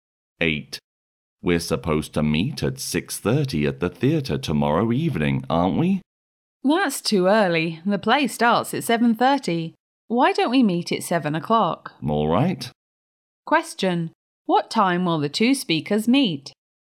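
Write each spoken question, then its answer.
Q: What time will the two speakers meet?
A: At 7 o'clock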